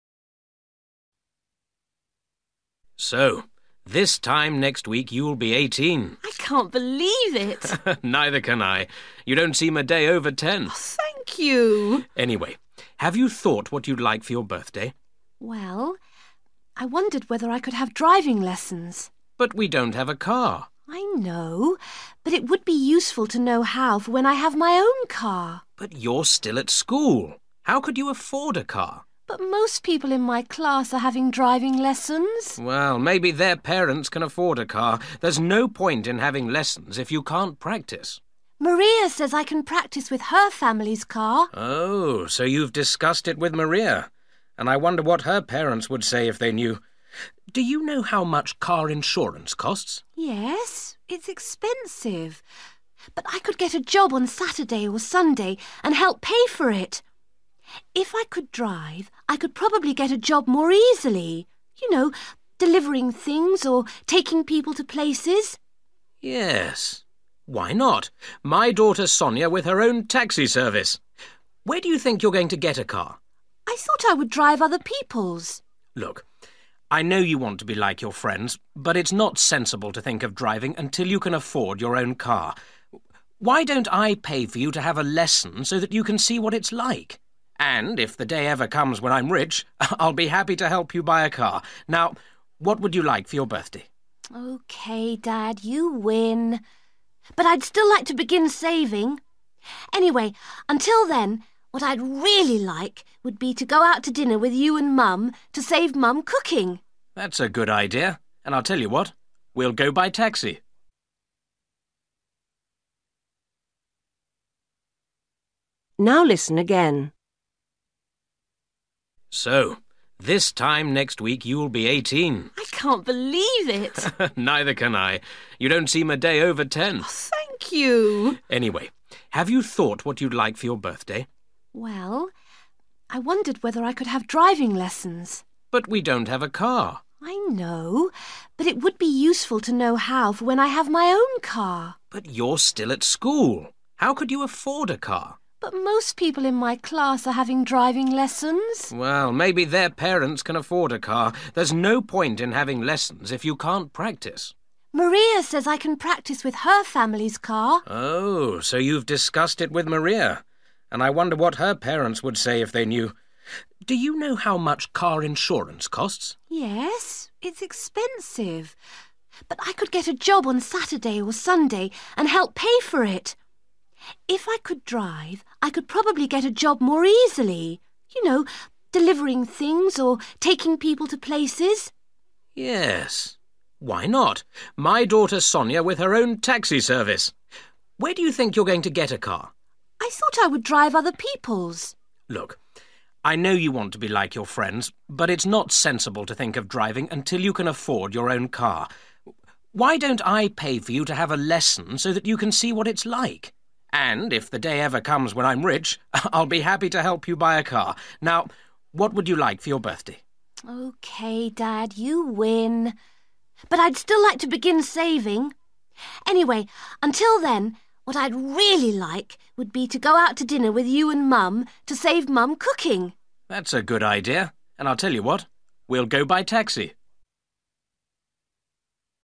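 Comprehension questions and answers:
Decide if each sentence is correct or incorrect. If it is correct, choose YES. If it is not correct, choose NO.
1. Sonia would like a car for her birthday.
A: NO

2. Sonia's friend Maria has her own car.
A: NO

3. Sonia has talked to Maria about learning to drive.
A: YES

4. Sonia offers to get a job at weekends.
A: YES

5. Sonia's father understands how his daughter feels.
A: YES

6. Sonia suggests cooking a meal on her birthday.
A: NO

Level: Luyện nghe trình độ B1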